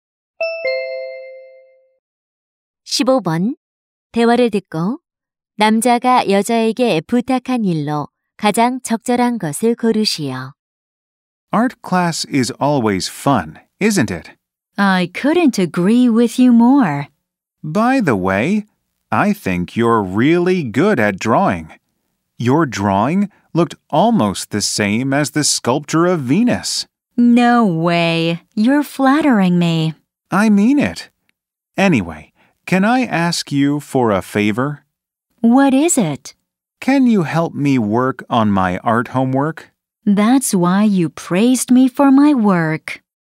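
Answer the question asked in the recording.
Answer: 미술 숙제 도와주기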